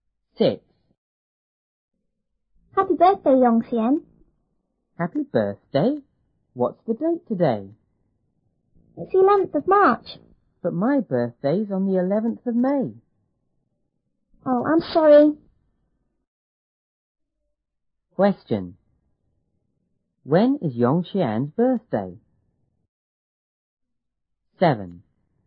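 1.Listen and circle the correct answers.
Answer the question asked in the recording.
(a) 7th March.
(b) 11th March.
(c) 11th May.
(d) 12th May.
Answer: (c) 11th May.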